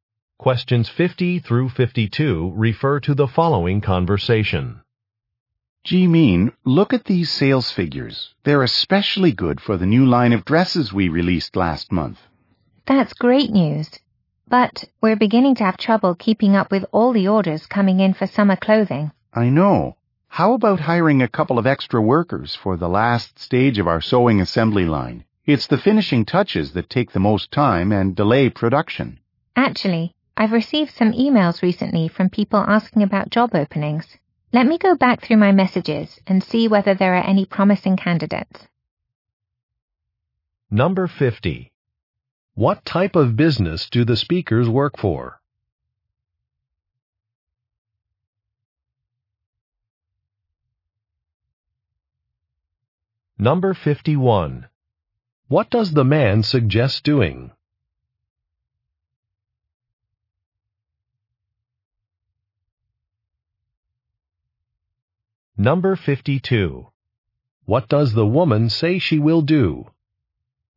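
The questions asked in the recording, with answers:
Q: What type of business do the speakers work for?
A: A clothing manufacturer

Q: What does the man suggest doing?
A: Hiring extra workers

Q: What does the woman say she will do?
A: Check her emails for job candidates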